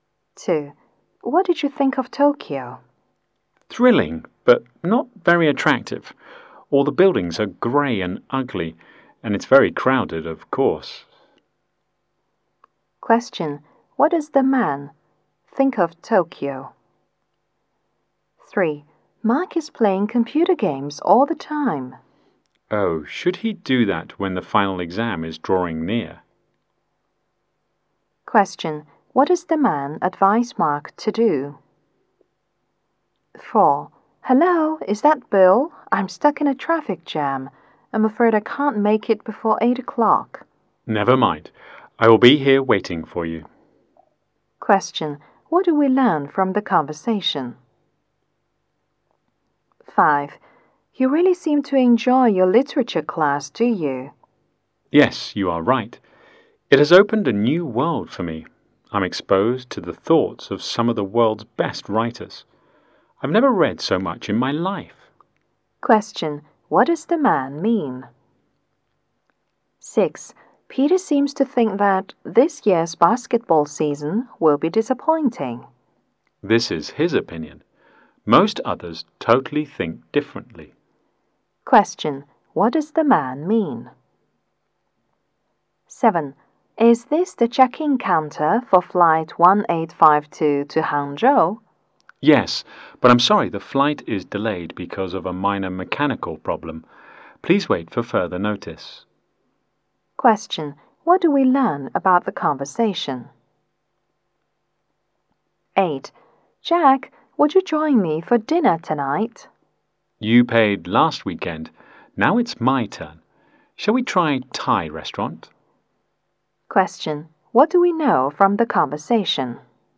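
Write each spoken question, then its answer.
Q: What does the man think of Tokyo?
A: Thrilling but not very attractive; grey, ugly and crowded

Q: What does the man advise Mark to do?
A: Stop playing computer games and prepare for the final exam

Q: What do we learn from the conversation?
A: The caller is stuck in traffic and will be late, and Bill will wait

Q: What does the man mean?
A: He really enjoys his literature class; it has opened a new world for him

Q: What does the man mean?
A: Most others disagree with Peter's opinion

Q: What do we learn about the conversation?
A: The flight is delayed because of a minor mechanical problem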